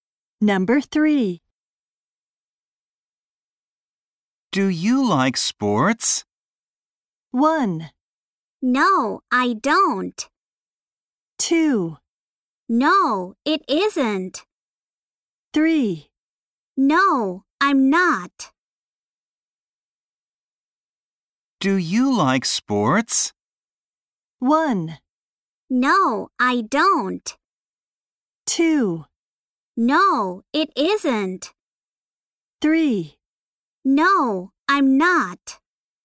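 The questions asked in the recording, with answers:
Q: Do you like sports?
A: 1: No, I don't.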